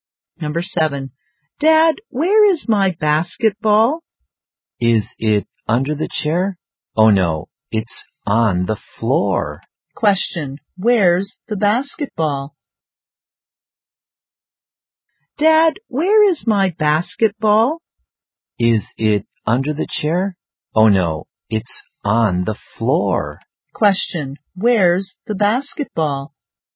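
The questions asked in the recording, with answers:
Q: Question, where's the basketball?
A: On the floor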